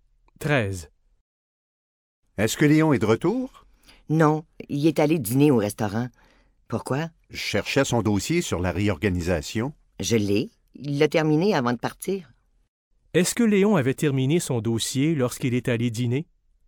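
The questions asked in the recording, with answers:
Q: Est-ce que Léon avait terminé son dossier lorsqu'il est allé dîner?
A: Oui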